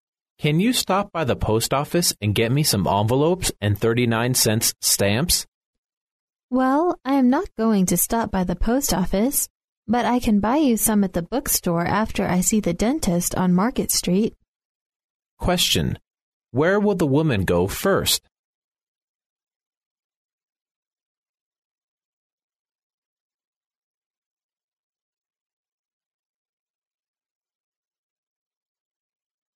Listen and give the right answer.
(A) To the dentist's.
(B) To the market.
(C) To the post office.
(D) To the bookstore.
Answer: (A) To the dentist's.

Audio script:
[听力原文] M: Can you stop by the post office and get me some envelopes and 39 cents' stamps? W: Well, I am not going to stop by the post office, but I can buy you some at the bookstore after I see the dentist on Market street. Q: Where will the woman go first?